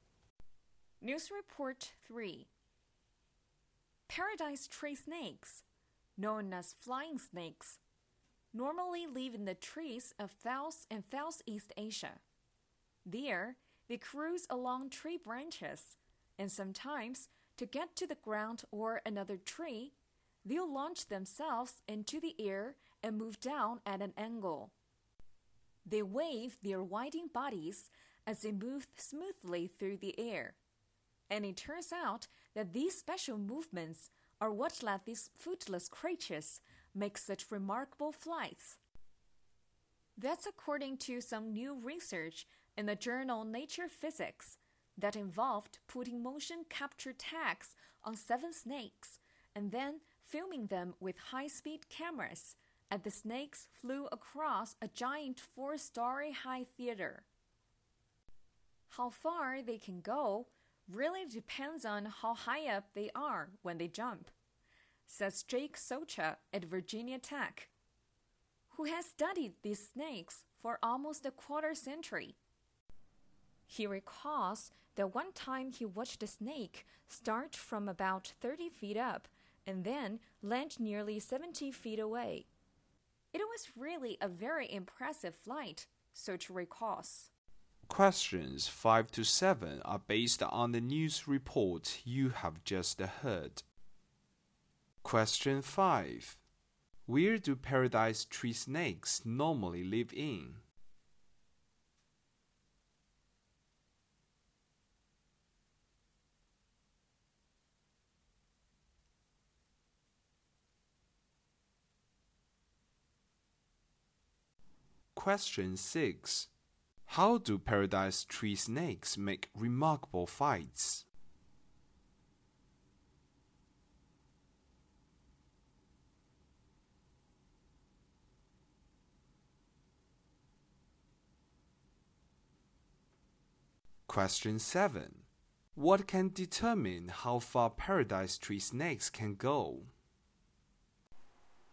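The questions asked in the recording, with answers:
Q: Where do paradise tree snakes normally live in?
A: In the trees of South and Southeast Asia.

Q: How do paradise tree snakes make remarkable flights?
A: By waving their winding bodies through the air.

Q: What can determine how far paradise tree snakes can go?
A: How high up they are when they jump.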